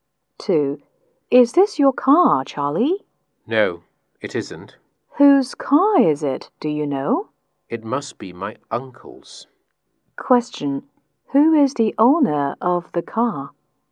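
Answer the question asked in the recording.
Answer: Charlie's uncle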